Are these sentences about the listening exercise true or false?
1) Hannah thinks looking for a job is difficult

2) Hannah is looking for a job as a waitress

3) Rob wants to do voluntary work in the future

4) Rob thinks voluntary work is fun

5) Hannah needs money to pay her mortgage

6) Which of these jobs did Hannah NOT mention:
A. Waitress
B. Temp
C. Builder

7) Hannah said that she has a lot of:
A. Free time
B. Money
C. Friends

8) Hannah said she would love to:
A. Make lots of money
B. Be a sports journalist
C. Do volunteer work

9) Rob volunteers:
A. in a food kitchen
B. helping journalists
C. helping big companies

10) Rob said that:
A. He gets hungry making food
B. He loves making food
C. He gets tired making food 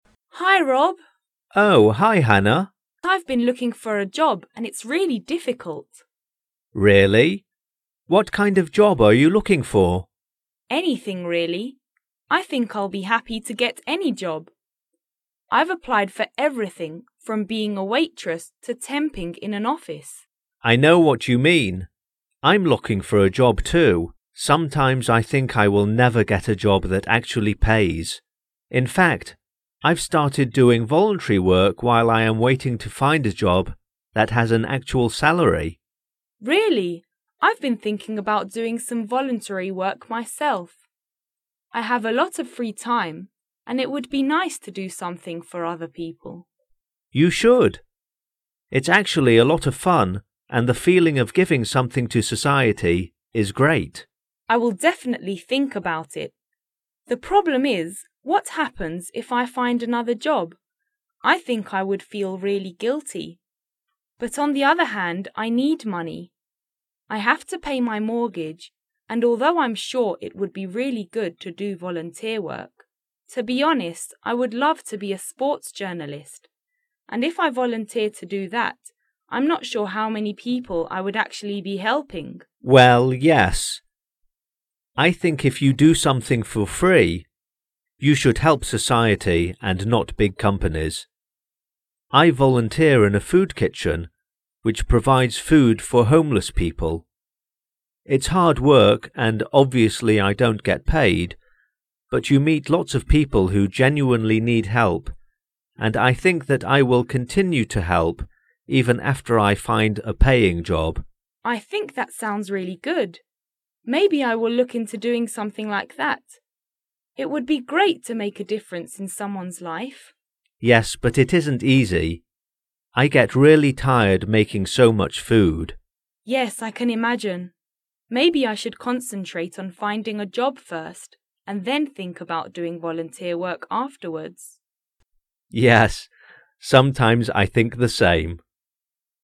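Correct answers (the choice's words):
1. True
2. False
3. True
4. True
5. True
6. Builder
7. Free time
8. Be a sports journalist
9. in a food kitchen
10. He gets tired making food

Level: 4o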